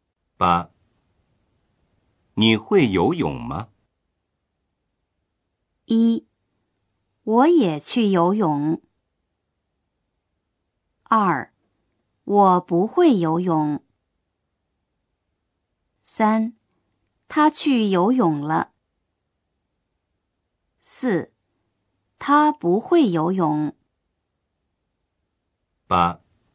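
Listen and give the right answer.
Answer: 2: 我不会游泳。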